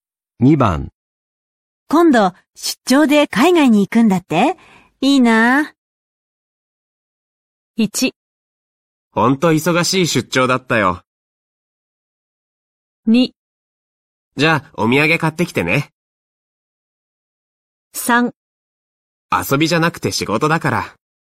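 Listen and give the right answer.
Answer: 3: 遊びじゃなくて仕事だから。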